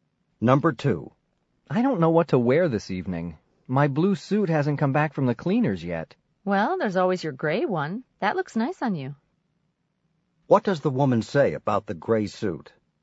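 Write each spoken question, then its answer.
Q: What does the woman say about the gray suit?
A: It looks nice on him.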